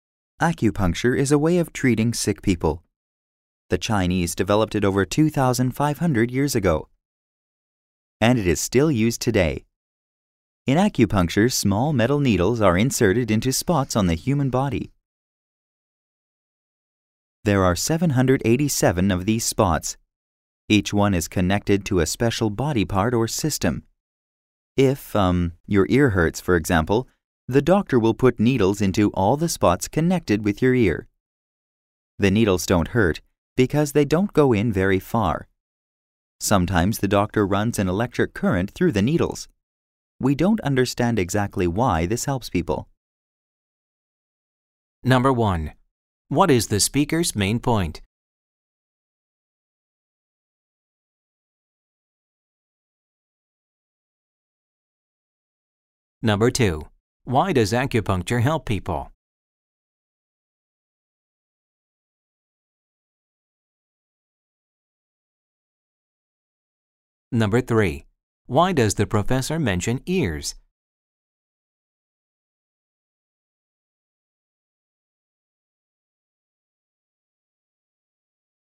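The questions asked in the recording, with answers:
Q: What is the speaker's main point?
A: Acupuncture is an old Chinese way of treating sick people by putting needles into special spots on the body

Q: Why does acupuncture help people?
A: Nobody understands exactly why

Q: Why does the professor mention ears?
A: As an example of how needles go into the spots connected to the body part that hurts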